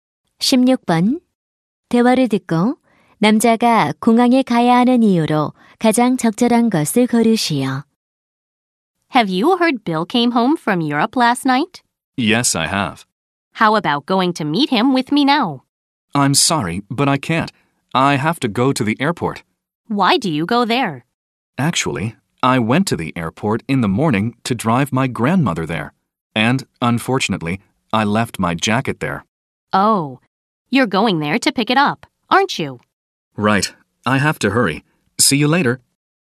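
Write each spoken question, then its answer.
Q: 대화를 듣고 남자가 공항에 가야 하는 이유로 가장 적절한 것을 고르시오.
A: 두고 온 재킷을 찾으러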